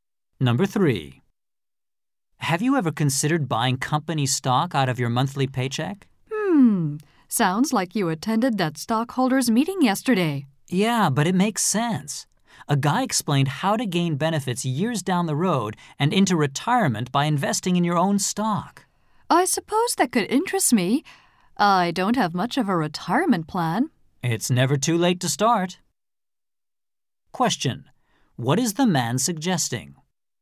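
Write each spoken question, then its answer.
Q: What is the man suggesting?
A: That the woman buy company stock from her paycheck for retirement.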